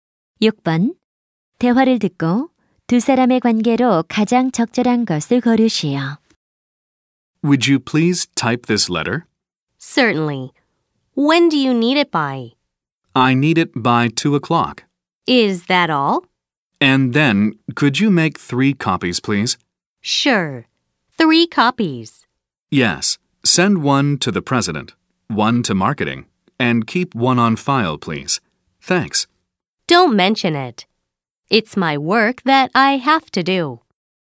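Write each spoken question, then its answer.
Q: 대화를 듣고 두 사람의 관계로 가장 적절한 것을 고르시오.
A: 상사와 비서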